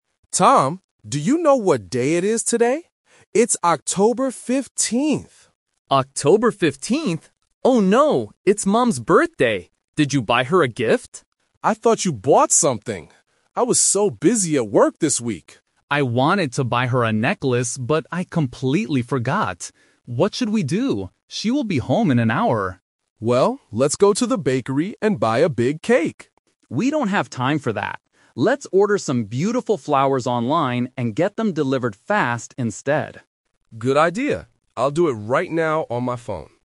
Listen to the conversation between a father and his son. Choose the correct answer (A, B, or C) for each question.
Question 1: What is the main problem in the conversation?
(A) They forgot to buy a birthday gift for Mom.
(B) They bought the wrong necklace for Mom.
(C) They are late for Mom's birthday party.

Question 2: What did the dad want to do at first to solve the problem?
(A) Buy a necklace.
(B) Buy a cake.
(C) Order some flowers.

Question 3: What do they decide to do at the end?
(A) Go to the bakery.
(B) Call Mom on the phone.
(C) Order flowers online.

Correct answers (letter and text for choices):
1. (A) They forgot to buy a birthday gift for Mom.
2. (B) Buy a cake.
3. (C) Order flowers online.

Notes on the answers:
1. Both of them realize it is Mom's birthday, and neither of them bought a gift because they thought the other person did it. Option (B) is a trap because Tom wanted to buy a necklace but forgot; he didn't buy the wrong one. Option (C) is a plausible problem but not mentioned.
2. When they realize they don't have a gift, the dad says: "let's go to the bakery and buy a big cake." Option (A) is a trap because the necklace was the son's original idea, not the dad's idea to solve the current problem. Option (C) is what they do at the end.
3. This is "The Twist". The dad wanted to buy a cake (Option A - the trap), but Tom says they don't have time. Tom suggests: "Let's order some beautiful flowers online... instead", and the dad agrees. Option (B) is a trap because the dad mentions his phone, but he uses it to order flowers, not to call the mom.

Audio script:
Dad: Tom, do you know what day it is today? It's October 15th!
Tom: October 15th... Oh no! It's Mom's birthday! Did you buy her a gift?
Dad: I thought you bought something! I was so busy at work this week.
Tom: I wanted to buy her a necklace, but I completely forgot. What should we do? She will be home in an hour.
Dad: Well, let's go to the bakery and buy a big cake.
Tom: We don't have time for that. Let's order some beautiful flowers online and get them delivered fast instead.